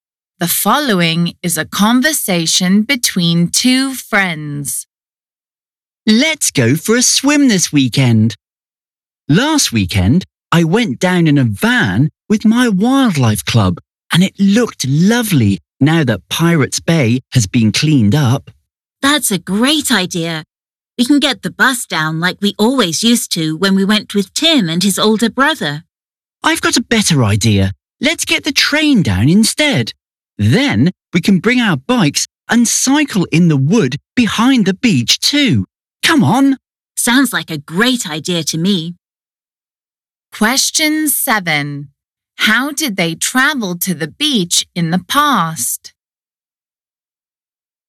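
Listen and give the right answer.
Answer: by bus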